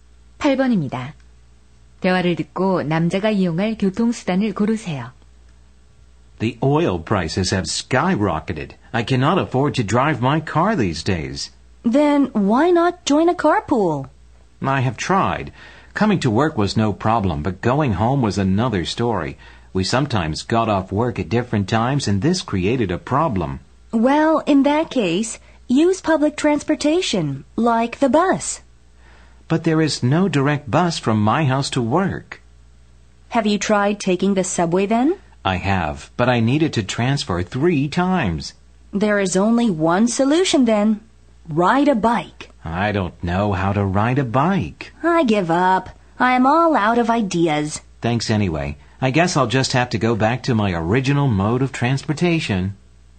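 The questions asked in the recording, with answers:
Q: 대화를 듣고 남자가 이용할 교통수단을 고르세요.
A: 자가용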